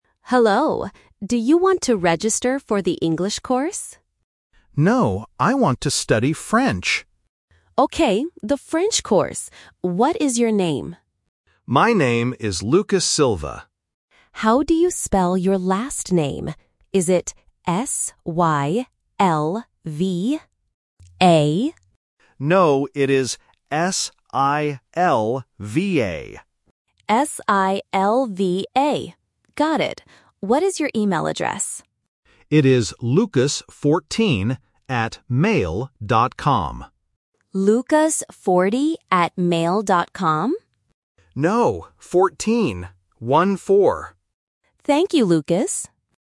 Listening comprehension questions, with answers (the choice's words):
Listen to the conversation between a receptionist and a student. Circle the correct answer for each question.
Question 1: What course does the student want to register for?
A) English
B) French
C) Spanish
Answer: French

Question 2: How does the student spell his last name?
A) S-Y-L-V-A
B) S-I-L-V-A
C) S-I-L-V-E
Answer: S-I-L-V-A

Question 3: What is the student's email address?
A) lucas14@mail.com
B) lucas40@mail.com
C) lucas44@mail.com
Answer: lucas14@mail.com

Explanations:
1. The student says, "I want to study French." Option (A) English is the trap because the staff asks about it first, but the student says "No." Option (C) Spanish is a plausible language but is never mentioned.
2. The student spells his last name "S-I-L-V-A." Option (A) S-Y-L-V-A is the trap because the staff guesses this spelling, but the student corrects it. Option (C) is not mentioned.
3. The student says his email has the number "14" and repeats "One-four." Option (B) lucas40 is the trap because the staff mishears "14" as "40" (a very common listening mistake for A1 learners). Option (C) is not mentioned.